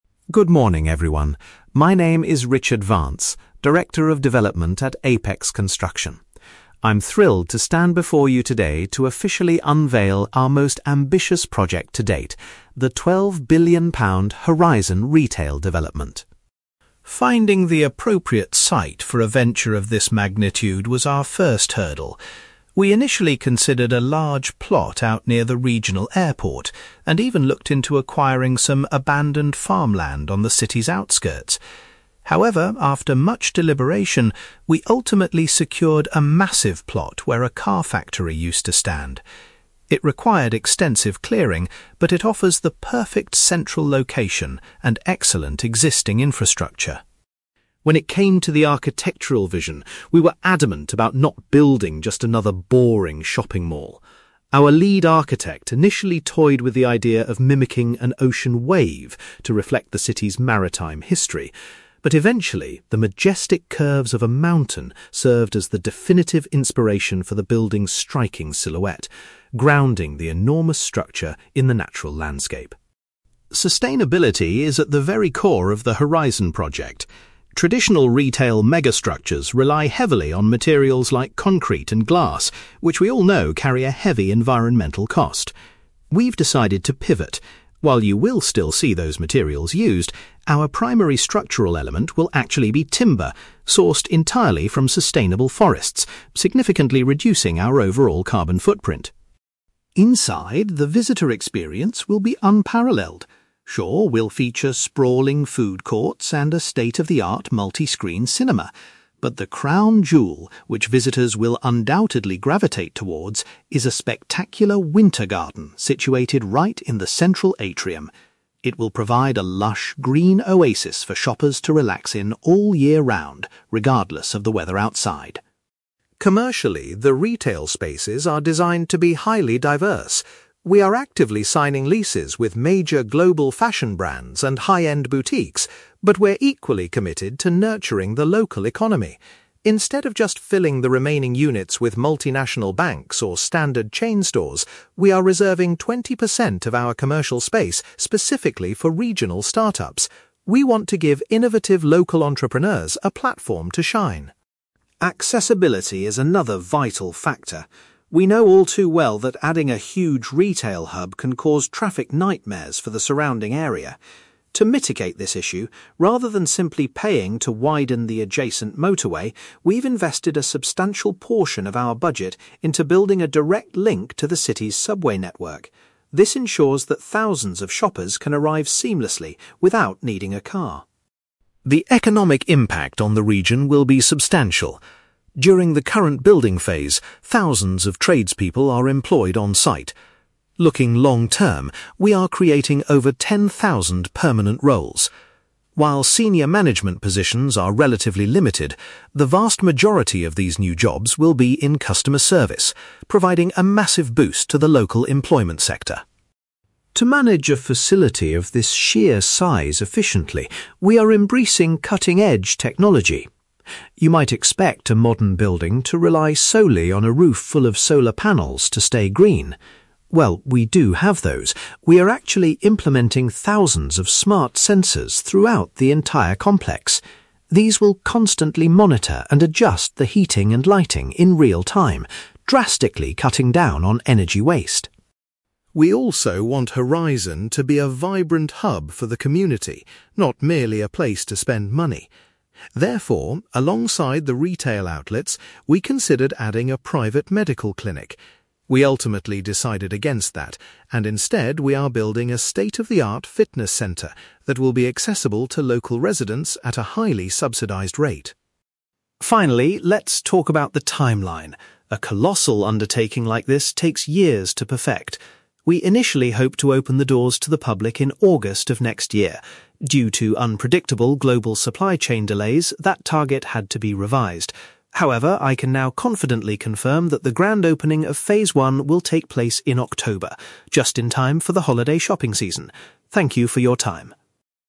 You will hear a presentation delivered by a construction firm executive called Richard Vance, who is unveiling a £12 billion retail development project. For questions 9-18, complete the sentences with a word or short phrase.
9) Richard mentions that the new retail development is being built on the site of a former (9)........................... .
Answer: factory

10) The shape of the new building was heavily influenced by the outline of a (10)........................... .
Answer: mountain

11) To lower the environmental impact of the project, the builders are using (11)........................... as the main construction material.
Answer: timber

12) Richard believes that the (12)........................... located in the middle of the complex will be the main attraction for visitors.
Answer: winter garden

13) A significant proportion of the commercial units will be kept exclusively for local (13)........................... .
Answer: start-ups

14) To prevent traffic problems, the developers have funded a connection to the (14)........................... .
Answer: subway network

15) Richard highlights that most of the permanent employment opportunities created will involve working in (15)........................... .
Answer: customer service

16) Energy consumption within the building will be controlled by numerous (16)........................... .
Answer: smart sensors

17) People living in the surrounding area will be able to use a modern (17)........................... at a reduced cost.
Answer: fitness centre

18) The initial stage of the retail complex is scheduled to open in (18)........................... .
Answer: October

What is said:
Richard Vance: Good morning, everyone. My name is Richard Vance, Director of Development at Apex Construction. I'm thrilled to stand before you today to officially unveil our most ambitious project to date: the £12 billion Horizon Retail Development.
Finding the appropriate site for a venture of this magnitude was our first hurdle. We initially considered a large plot out near the regional airport, and even looked into acquiring some abandoned farmland on the city's outskirts. However, after much deliberation, we ultimately secured a massive plot where a car factory used to stand. It required extensive clearing, but it offers the perfect central location and excellent existing infrastructure.
When it came to the architectural vision, we were adamant about not building just another boring shopping mall. Our lead architect initially toyed with the idea of mimicking an ocean wave to reflect the city's maritime history. But eventually, the majestic curves of a mountain served as the definitive inspiration for the building's striking silhouette, grounding the enormous structure in the natural landscape.
Sustainability is at the very core of the Horizon project. Traditional retail mega-structures rely heavily on materials like concrete and glass, which we all know carry a heavy environmental cost. We've decided to pivot. While you will still see those materials used, our primary structural element will actually be timber, sourced entirely from sustainable forests, significantly reducing our overall carbon footprint.
Inside, the visitor experience will be unparalleled. Sure, we'll feature sprawling food courts and a state-of-the-art multi-screen cinema. But the crown jewel, which visitors will undoubtedly gravitate towards, is a spectacular winter garden situated right in the central atrium. It will provide a lush, green oasis for shoppers to relax in all year round, regardless of the weather outside.
Commercially, the retail spaces are designed to be highly diverse. We are actively signing leases with major global fashion brands and high-end boutiques. But we're equally committed to nurturing the local economy. Instead of just filling the remaining units with multinational banks or standard chain stores, we are reserving twenty percent of our commercial space specifically for regional start-ups. We want to give innovative local entrepreneurs a platform to shine.
Accessibility is another vital factor. We know all too well that adding a huge retail hub can cause traffic nightmares for the surrounding area. To mitigate this issue, rather than simply paying to widen the adjacent motorway, we've invested a substantial portion of our budget into building a direct link to the city's subway network. This ensures that thousands of shoppers can arrive seamlessly without needing a car.
The economic impact on the region will be substantial. During the current building phase, thousands of tradespeople are employed on-site. Looking long-term, we are creating over ten thousand permanent roles. While senior management positions are relatively limited, the vast majority of these new jobs will be in customer service, providing a massive boost to the local employment sector.
To manage a facility of this sheer size efficiently, we are embracing cutting-edge technology. You might expect a modern building to rely solely on a roof full of solar panels to stay green. While we do have those, we are actually implementing thousands of smart sensors throughout the entire complex. These will constantly monitor and adjust the heating and lighting in real-time, drastically cutting down on energy waste.
We also want Horizon to be a vibrant hub for the community, not merely a place to spend money. Therefore, alongside the retail outlets, we considered adding a private medical clinic. We ultimately decided against that, and instead, we are building a state-of-the-art fitness centre that will be accessible to local residents at a highly subsidized rate.
Finally, let's talk about the timeline. A colossal undertaking like this takes years to perfect. We initially hoped to open the doors to the public in August of next year. Due to unpredictable global supply chain delays, that target had to be revised. However, I can now confidently confirm that the grand opening of phase one will take place in October, just in time for the holiday shopping season. Thank you for your time.

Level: B2